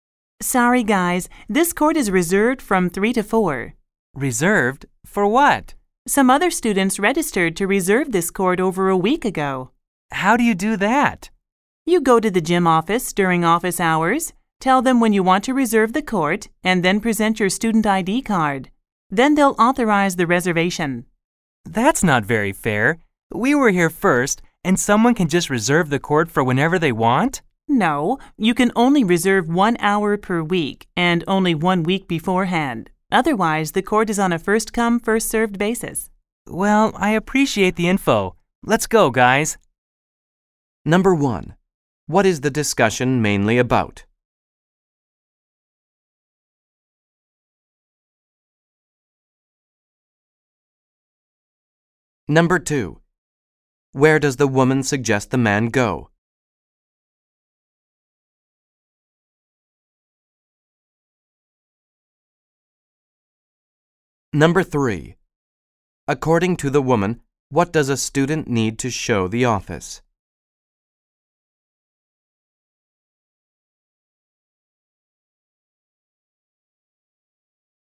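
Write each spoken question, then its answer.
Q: What is the discussion mainly about?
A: How to reserve the court

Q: Where does the woman suggest the man go?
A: The gym office

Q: According to the woman, what does a student need to show the office?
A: Their student ID card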